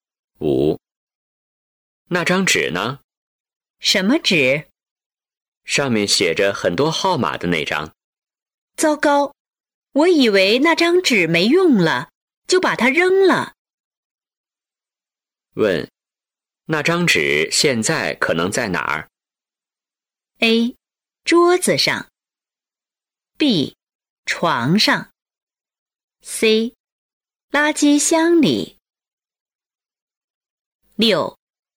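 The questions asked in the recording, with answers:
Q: 问,那张纸现在可能在哪儿?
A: C: 垃圾箱里。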